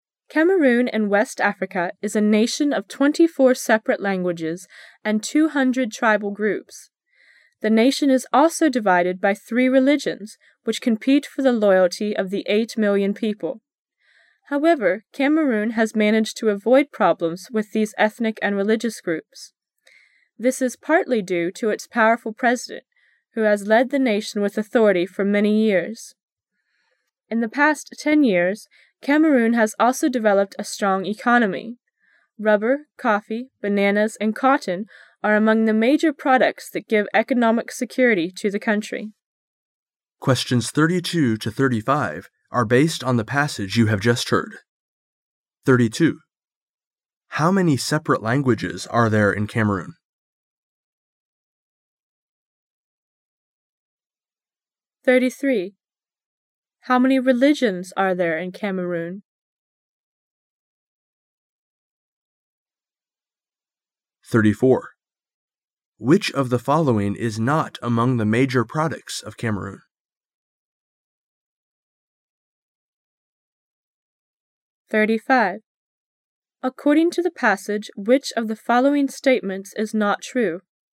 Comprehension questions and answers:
Passage Three Questions 32 to 35 are based on the passage you have just heard.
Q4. According to the passage,which of the following statements is not true?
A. Cameroon is in West Africa.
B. Cameroon is divided by three religions which compete for the loyalty of the 8 million people.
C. Cameroon has developed a strong economy in the past 10 years.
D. Religious conflict is a major social problem in Cameroon.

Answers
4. D

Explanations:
[详细解答] 该题要求选出错误的评述。只有 D项与全文主要思想不符,因此D为正确选项。

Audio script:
[解析] 32-35 Cameroon in West Africa is a nation of 24 separate languages and 200 tribal groups. The nation is also divided by three religions which compete for the loyalty of the 8 million people. However, Cameroon has managed to avoid problems with these ethnic and religious groups. This is partly due to its powerful president who has led the nation with authority for many years. In the past 10 years, Cameroon has also developed a strong economy. Rubber, coffee, bananas, and cotton are among the major products that give economic security to the country. 32.How many separate languages are there in Cameroon?

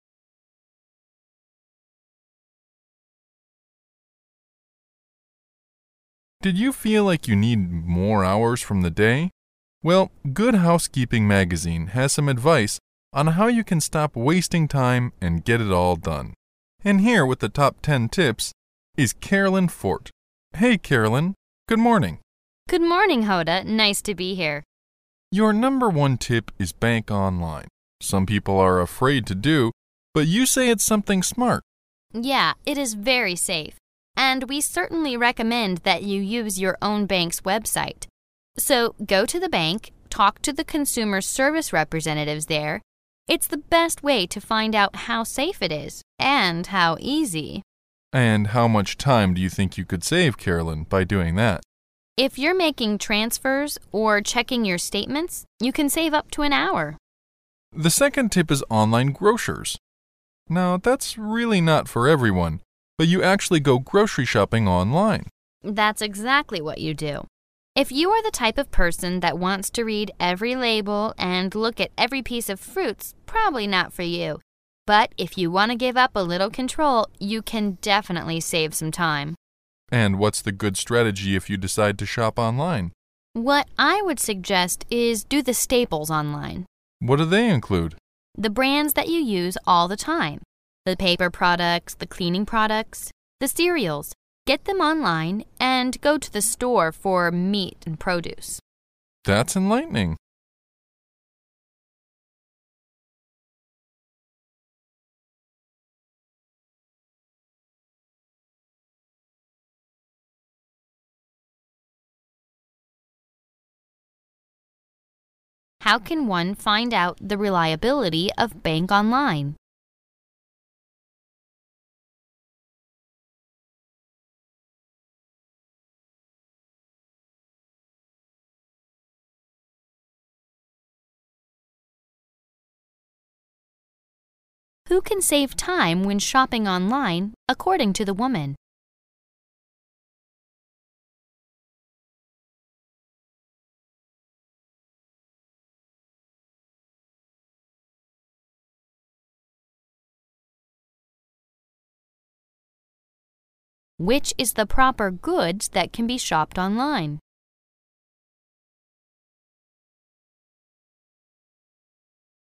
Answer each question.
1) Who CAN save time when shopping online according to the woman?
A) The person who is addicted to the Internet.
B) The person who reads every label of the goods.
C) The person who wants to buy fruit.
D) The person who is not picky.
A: D

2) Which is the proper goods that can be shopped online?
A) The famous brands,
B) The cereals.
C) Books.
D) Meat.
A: B

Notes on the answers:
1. 根据对话中提到的But if you wanna give up a little control,you can definitely save some time可推测,网上购物时不挑剔的人能节省时间,故[D]为答案。
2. 对话末尾提到的The brands that you use all the time,the paper products,the cleaning products,the cereals 表明[B]为答案。[A]为干扰项,文中提到的是经常使用的品牌,而不是名牌,故可排除。

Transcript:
[解析] 23-25 M: Did you feel like you need more hours from the day? Well, Good Housekeeping Magazine has some advice on how you can stop wasting time and get it all done. And here with the top ten tips, is Casslyn Forte. Hey, Carolyn, good morning! W: Good morning, Hoda. Nice to be here! I tip is bank online. Some people are afraid to do but you say it's something smart. W: Yeah, it is very safe. And we certainly recommend that you use your own bank's website. So go to the bank, talk to the consumer service representatives there. It's the best way to find out how safe it is and how easy... M: And how much time do you think you could save, Carolyn, by doing that? W: If you're making transfers, or checking your statements, you can save up to an hour. M: The second tip is online grocers. Now, that's really not for everyone, but you actually go grocery shopping online. W: That's exactly what you do. If you are the type of person that wants to read every label and look at every piece of fruit's probably not for you. But if you wanna give up a little control, you can definitely save some time. M: And what's the good strategy if you decide to shop online? W: What I would suggest is do the staples online. M: What do they include? W: The brands that you use all the time, the paper products, the cleaning products, the cereals -- get them online and go to the store for the meat, the produce. M: That's enlightening. 23.How can one find out the reliability of bank online?

